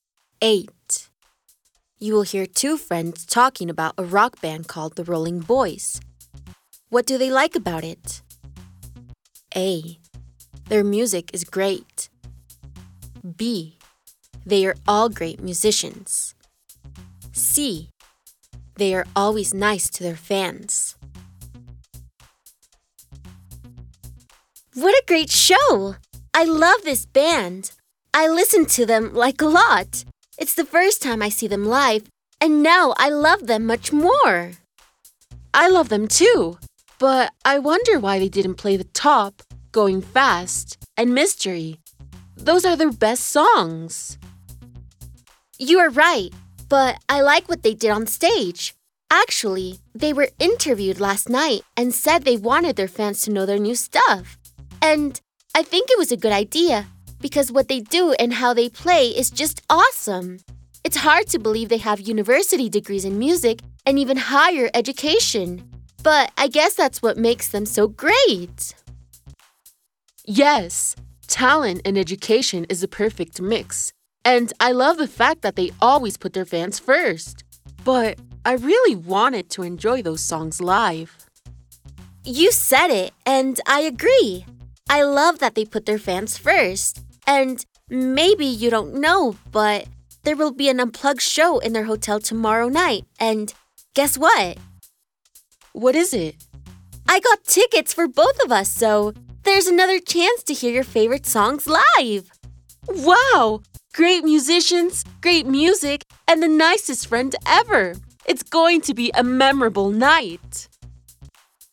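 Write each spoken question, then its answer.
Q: What do they like about it?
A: C: They are always nice to their fans.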